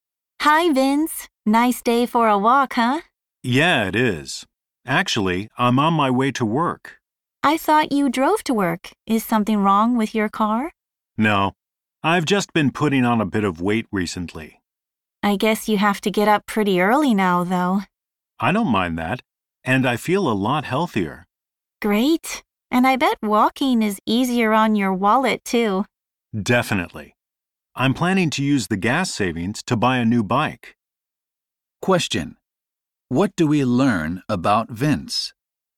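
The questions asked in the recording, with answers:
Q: What do we learn about Vince?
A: He walks to work now to lose weight and plans to buy a new bike with the gas savings.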